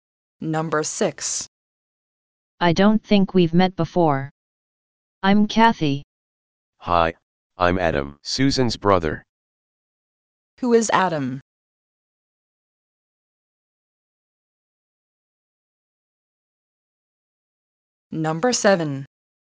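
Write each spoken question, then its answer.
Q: Who is Adam?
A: Susan's brother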